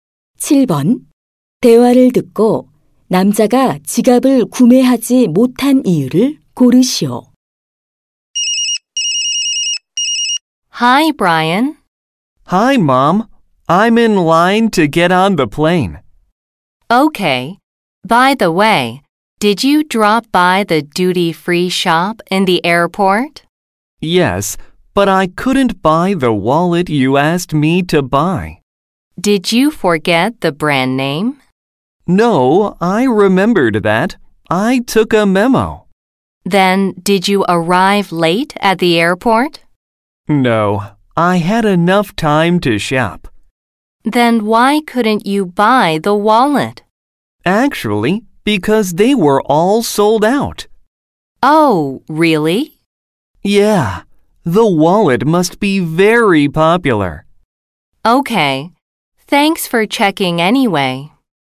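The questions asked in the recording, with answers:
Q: 대화를 듣고 남자가 지갑을 구매하지 못한 이유를 고르시오.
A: 지갑이 모두 품절되어서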